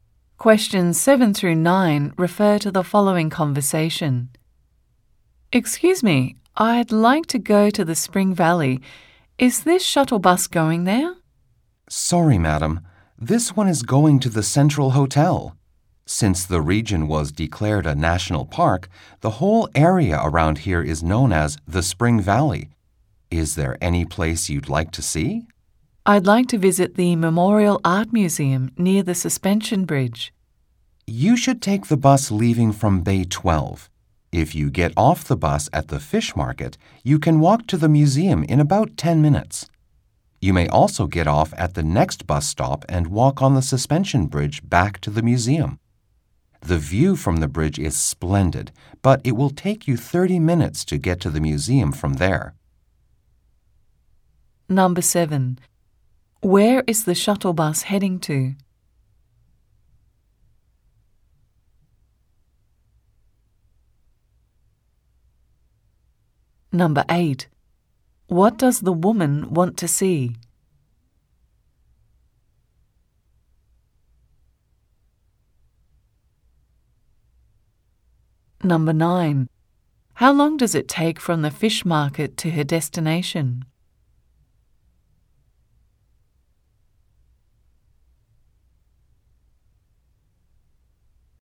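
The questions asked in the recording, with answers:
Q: Where is the shuttle bus heading to?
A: The Central Hotel

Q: What does the woman want to see?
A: The Memorial Art Museum

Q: How long does it take from the fish market to her destination?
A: About 10 minutes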